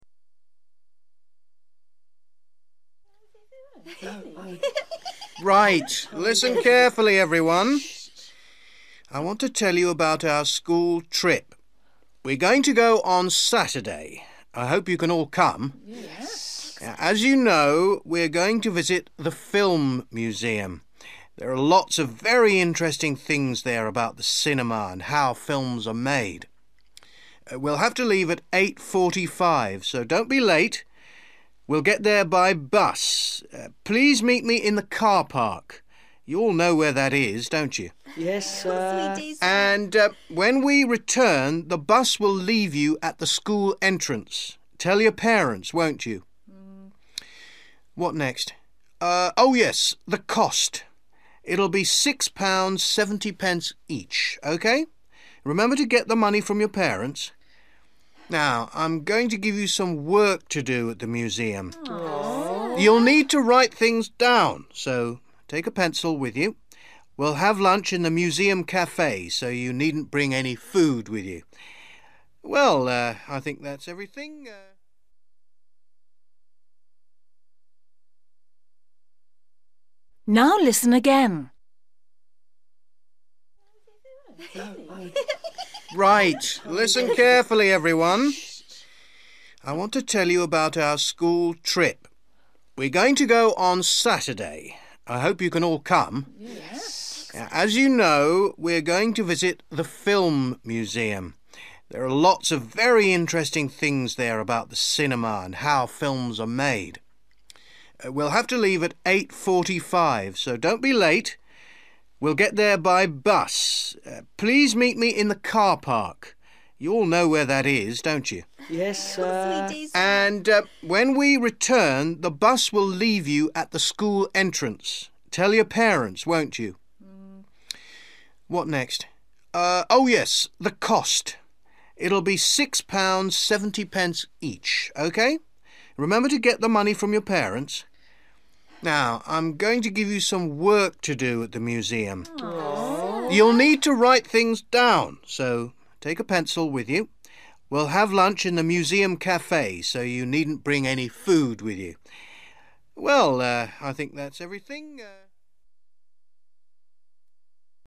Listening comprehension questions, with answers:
Listen and complete questions 21-25.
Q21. Visit:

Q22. Leave at:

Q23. Meet in:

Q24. Cost:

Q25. Bring:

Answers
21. film museum(s)
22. 8.45 (a.m./am) / quarter to nine
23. (the) car park
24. (£)6.70 (each)
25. (a) pencil(s)

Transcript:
Teacher: Right, listen carefully, everyone. I want to tell you about our school trip. We're going to go on Saturday. I hope you can all come. As you know, we're going to visit the film museum. There are lots of very interesting things there about the cinema and how films are made. We'll have to leave at eight forty-five so don't be late. We'll get there by bus. Please meet me in the car park. You all know where that is, don't you? And when we return, the bus will leave you at the school entrance. Tell your parents, won't you?
What next? Oh yes, the cost. It'll be six pounds seventy pence each, OK? Remember to get the money from your parents.
Now, I'm going to give you some work to do at the museum. You'll need to write things down, so take a pencil with you. We'll have lunch in the museum café so you needn't bring any food with you. Well, I think that's everything ...

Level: A2